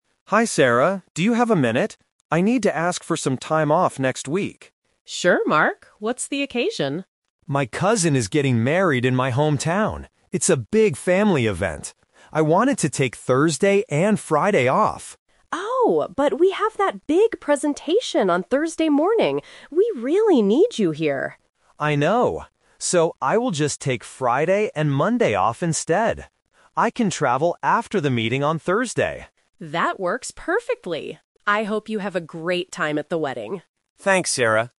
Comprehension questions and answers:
Listen to the conversation between an employee and his manager. Choose the correct answer (A, B, or C) for each question.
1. Why does Mark need time off?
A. To go on a vacation.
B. To attend his cousin's wedding.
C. To prepare for a presentation.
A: To attend his cousin's wedding.

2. What is happening on Thursday morning?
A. A wedding.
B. A big presentation.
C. A flight to his hometown.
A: A big presentation.

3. Which days will Mark take off from work?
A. Thursday and Friday.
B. Friday and Monday.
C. Thursday and Monday.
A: Friday and Monday.

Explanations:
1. Mark clearly states his reason: "My cousin is getting married in my hometown." Option (C) is a trap because the presentation is the reason he can't take Thursday off, not the reason he needs a break. Option (A) is a plausible reason for time off but is not mentioned.
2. Sarah says, "we have that big presentation on Thursday morning." Option (A) is a trap because the wedding is the reason for the trip, but it's not happening on Thursday morning at the office. Option (C) is plausible but not mentioned.
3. This is "The Twist". Mark says he wanted to take Thursday and Friday off (Option A - the trap). But because of the presentation, he changes his mind and says: "I will just take Friday and Monday off instead." Option (C) is a mix of days and is incorrect.

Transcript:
Mark (Employee): Hi Sarah, do you have a minute? I need to ask for some time off next week.
Sarah (Manager): Sure, Mark. What's the occasion?
Mark: My cousin is getting married in my hometown. It's a big family event. I wanted to take Thursday and Friday off...
Sarah: Oh, but we have that big presentation on Thursday morning. We really need you here.
Mark: I know. So, I will just take Friday and Monday off instead. I can travel after the meeting on Thursday.
Sarah: That works perfectly. I hope you have a great time at the wedding!
Mark: Thanks, Sarah.

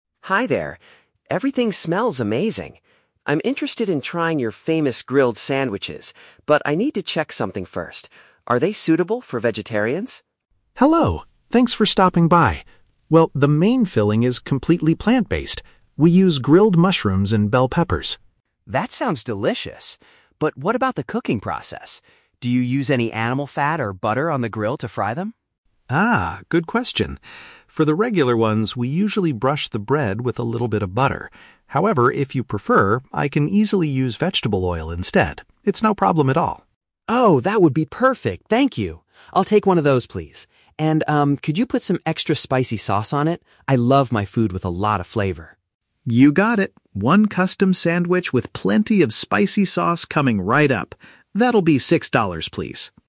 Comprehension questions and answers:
Listen to a conversation between a customer and a food truck owner at a festival. Choose the correct answer (A, B, or C) for each question.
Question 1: What is the customer's main dietary requirement?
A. He prefers to eat completely raw vegetables.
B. He only consumes meat-free products.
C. He is highly allergic to mushrooms and peppers.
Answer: He only consumes meat-free products.

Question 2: What change will the owner make to prepare the customer's food?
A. He will cook the meal using a plant-based liquid instead of dairy.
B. He will remove the animal fat from the sandwich filling.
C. He will grill the bread for a much longer time than usual.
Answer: He will cook the meal using a plant-based liquid instead of dairy.

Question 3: What special request does the customer make at the end?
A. To pack the meal in a box to take away.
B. To reduce the amount of salt used in the cooking.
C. To add a generous amount of a flavoring liquid.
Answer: To add a generous amount of a flavoring liquid.

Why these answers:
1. The customer asks if the food is "suitable for vegetarians." Option (B) uses a paraphrase ("meat-free products" = vegetarian food). Option (A) is a trap; the owner mentions vegetables (mushrooms, bell peppers), but they are "grilled," not raw. Option (C) is a trap; the customer says the mushrooms and peppers sound "delicious," so he is not allergic to them.
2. The owner says he usually uses "butter" (dairy) but will use "vegetable oil" (plant-based liquid) instead. Option (A) paraphrases this perfectly. Option (B) is a trap; the owner does mention "animal fat," but the filling is already "completely plant-based." The fat/butter is used on the bread, not the filling. Option (C) is a plausible guess but is never mentioned.
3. The customer asks the owner to "put some extra spicy sauce on it." Option (C) uses synonyms ("generous amount" =

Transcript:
Customer: Hi there! Everything smells amazing. I'm interested in trying your famous grilled sandwiches, but I need to check something first. Are they suitable for vegetarians?
Food Truck Owner: Hello! Thanks for stopping by. Well, the main filling is completely plant-based. We use grilled mushrooms and bell peppers.
Customer: That sounds delicious. But what about the cooking process? Do you use any animal fat or butter on the grill to fry them?
Food Truck Owner: Ah, good question. For the regular ones, we usually brush the bread with a little bit of butter. However, if you prefer, I can easily use vegetable oil instead. It's no problem at all.
Customer: Oh, that would be perfect, thank you! I'll take one of those, please. And, um, could you put some extra spicy sauce on it? I love my food with a lot of flavor.
Food Truck Owner: You got it! One custom sandwich with plenty of spicy sauce coming right up.

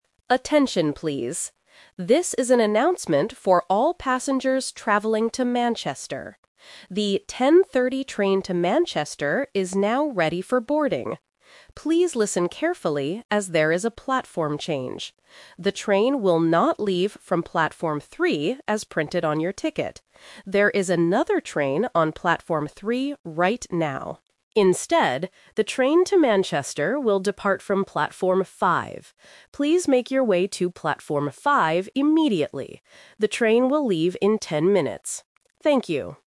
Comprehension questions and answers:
Listen to the announcement at the train station and choose the correct answer (A, B, or C).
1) Where is the train going?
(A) To London.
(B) To Manchester.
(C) To the city center.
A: To Manchester.

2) Which platform should the passengers go to NOW?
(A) Platform 3.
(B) Platform 5.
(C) Platform 10.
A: Platform 5.

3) Why did the platform change?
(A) Because the train is broken.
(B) Because the train is late.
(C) Because there is another train on the old platform.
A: Because there is another train on the old platform.

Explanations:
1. The announcer explicitly says, "This is an announcement for all passengers traveling to Manchester." Options (A) and (C) are plausible destinations for a train but are not mentioned in the audio.
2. This is "The Twist". The announcer says the train will NOT leave from "Platform 3" (Option A - The Trap), which is printed on the ticket. The final instruction is: "the train to Manchester will depart from Platform 5." Option (C) is a trap using the number "ten" from the departure time (ten minutes).
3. The announcer gives a clear reason for the change: "There is another train on Platform 3 right now." Options (A) and (B) are common reasons for train problems, but they are not the reason for this platform change.

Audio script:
Announcer: Attention, please. This is an announcement for all passengers traveling to Manchester. The 10:30 train to Manchester is now ready for boarding. Please listen carefully, as there is a platform change. The train will not leave from Platform 3, as printed on your ticket. There is another train on Platform 3 right now. Instead, the train to Manchester will depart from Platform 5. Please make your way to Platform 5 immediately. The train will leave in ten minutes. Thank you.

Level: A2

